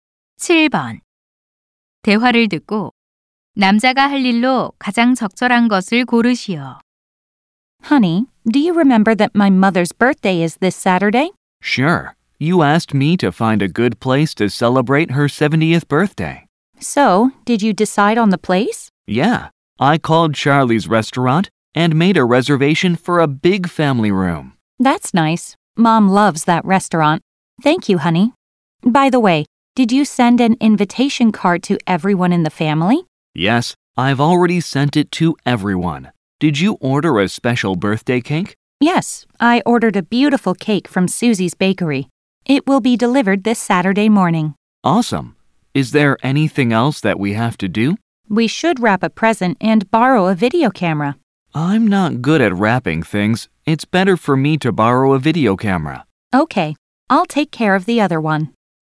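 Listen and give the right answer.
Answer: 비디오카메라 빌리기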